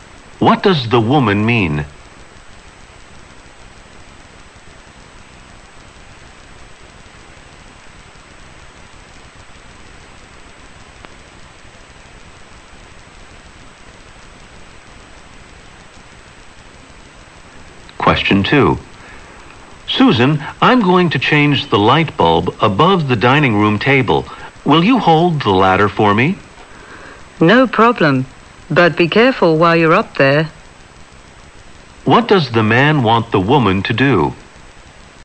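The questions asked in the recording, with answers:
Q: What does the man want the woman to do?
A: Hold the ladder for him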